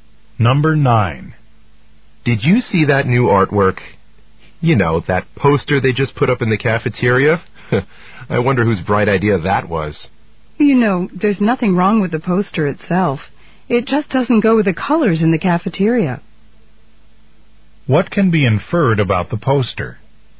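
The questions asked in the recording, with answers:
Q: What can be inferred about the poster?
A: Its colors don't match the cafeteria.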